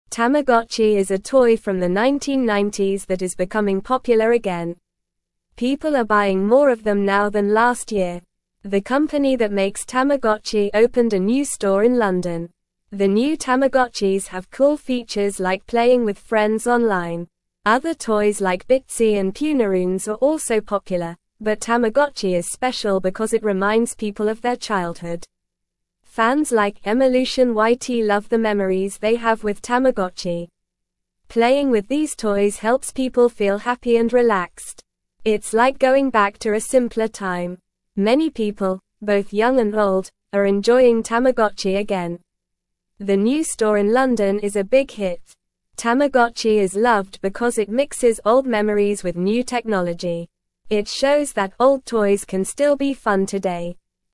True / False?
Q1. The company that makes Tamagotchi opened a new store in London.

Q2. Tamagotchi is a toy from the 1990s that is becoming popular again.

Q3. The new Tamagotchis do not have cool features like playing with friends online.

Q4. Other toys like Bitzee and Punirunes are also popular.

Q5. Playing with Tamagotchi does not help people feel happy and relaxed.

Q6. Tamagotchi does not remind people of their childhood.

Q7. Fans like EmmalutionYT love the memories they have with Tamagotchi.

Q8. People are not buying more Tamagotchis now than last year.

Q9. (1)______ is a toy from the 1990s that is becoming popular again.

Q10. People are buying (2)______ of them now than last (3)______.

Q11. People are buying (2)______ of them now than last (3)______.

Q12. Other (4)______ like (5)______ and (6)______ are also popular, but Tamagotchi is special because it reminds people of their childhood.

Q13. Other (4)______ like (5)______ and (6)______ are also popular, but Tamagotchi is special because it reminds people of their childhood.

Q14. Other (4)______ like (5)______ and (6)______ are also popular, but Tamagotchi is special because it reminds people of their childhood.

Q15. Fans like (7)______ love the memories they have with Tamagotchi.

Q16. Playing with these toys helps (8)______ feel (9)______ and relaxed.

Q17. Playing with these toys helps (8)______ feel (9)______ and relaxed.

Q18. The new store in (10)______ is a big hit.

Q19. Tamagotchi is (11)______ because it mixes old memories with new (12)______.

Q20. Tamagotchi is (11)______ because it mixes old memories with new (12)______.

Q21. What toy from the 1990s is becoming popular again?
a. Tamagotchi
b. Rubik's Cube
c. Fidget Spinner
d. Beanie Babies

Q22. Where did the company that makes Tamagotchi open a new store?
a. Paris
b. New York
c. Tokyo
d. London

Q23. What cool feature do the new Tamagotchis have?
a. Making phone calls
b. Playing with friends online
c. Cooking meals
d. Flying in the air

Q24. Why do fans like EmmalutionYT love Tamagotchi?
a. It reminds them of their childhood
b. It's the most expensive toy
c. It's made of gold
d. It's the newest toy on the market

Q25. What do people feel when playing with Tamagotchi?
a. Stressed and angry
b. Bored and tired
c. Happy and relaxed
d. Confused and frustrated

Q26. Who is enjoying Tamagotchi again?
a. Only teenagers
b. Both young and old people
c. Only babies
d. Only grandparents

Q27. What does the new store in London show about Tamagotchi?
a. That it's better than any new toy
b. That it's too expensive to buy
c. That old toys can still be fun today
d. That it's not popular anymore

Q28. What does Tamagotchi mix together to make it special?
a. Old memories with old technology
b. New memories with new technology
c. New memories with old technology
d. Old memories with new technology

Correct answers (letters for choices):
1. True
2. True
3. False
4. True
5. False
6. False
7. True
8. False
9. Tamagotchi
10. more
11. year
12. toys
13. Bitzee
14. Punirunes
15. EmmalutionYT
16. people
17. happy
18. London
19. loved
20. technology
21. a
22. d
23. b
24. a
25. c
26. b
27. c
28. d

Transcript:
People are buying more of them now than last year. The new Tamagotchis have cool features like playing with friends online.
Other toys like Bitzee and Punirunes are also popular, but Tamagotchi is special because it reminds people of their childhood. Playing with these toys helps people feel happy and relaxed. It's like going back to a simpler time.
Many people, both young and old, are enjoying Tamagotchi again. The new store in London is a big hit. Tamagotchi is loved because it mixes old memories with new technology. It shows that old toys can still be fun today.

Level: Level 2